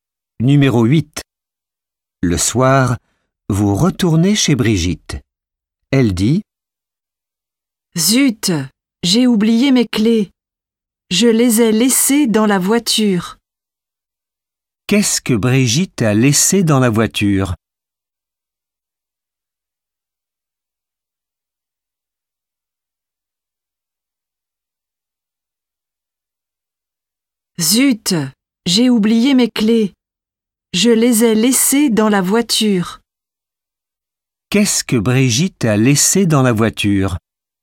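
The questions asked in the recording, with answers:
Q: Qu'est-ce que Brigitte a laissé dans la voiture?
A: Ses clés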